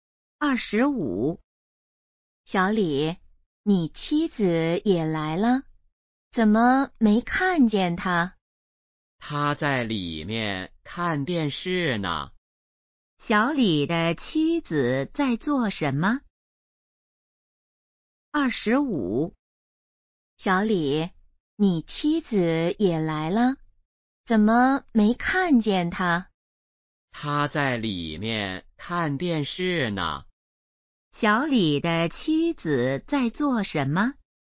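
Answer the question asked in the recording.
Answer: 看电视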